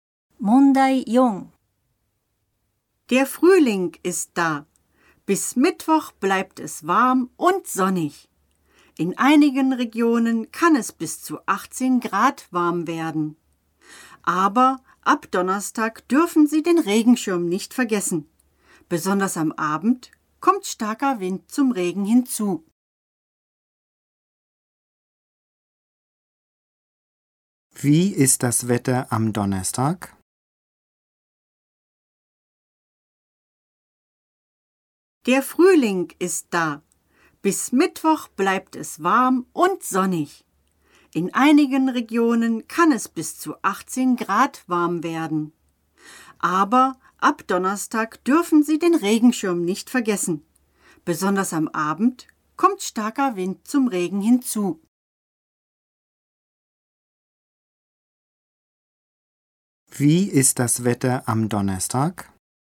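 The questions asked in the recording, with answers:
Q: Wie ist das Wetter am Donnerstag?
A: Es regnet, am Abend mit starkem Wind.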